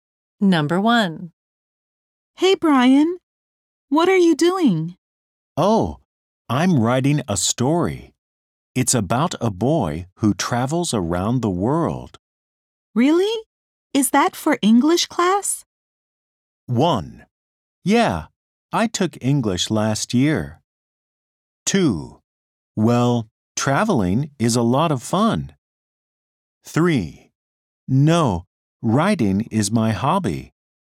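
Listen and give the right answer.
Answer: 3: No. Writing is my hobby.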